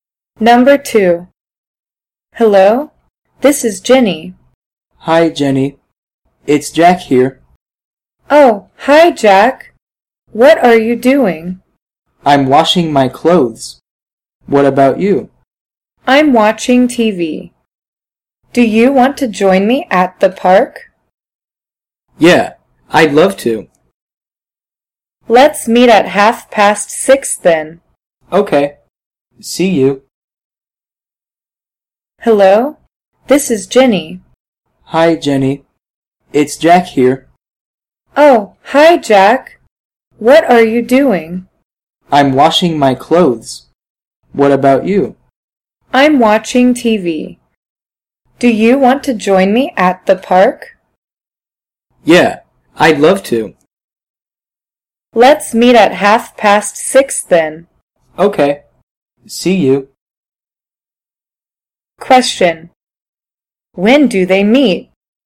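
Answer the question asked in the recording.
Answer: At 6:30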